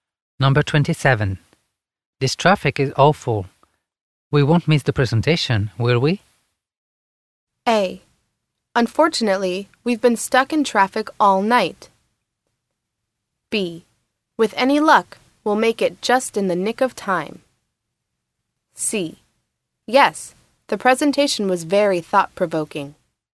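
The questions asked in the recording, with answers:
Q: This traffic is awful. We won't miss the presentation, will we?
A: B: With any luck, we'll make it just in the nick of time.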